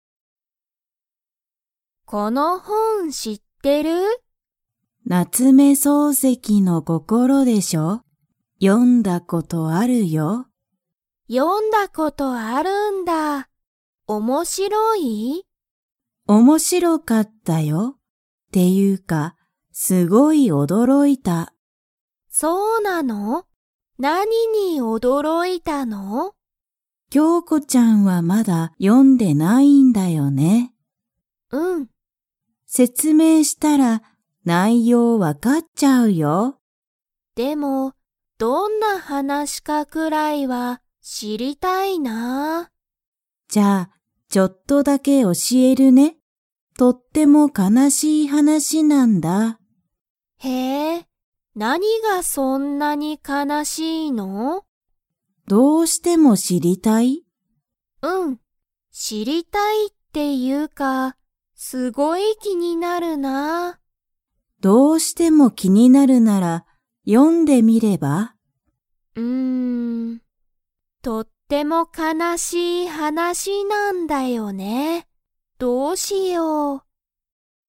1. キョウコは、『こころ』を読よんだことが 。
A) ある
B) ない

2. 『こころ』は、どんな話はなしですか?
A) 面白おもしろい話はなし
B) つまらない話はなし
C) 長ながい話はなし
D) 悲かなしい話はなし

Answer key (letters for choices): 1B, 2D

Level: Level 3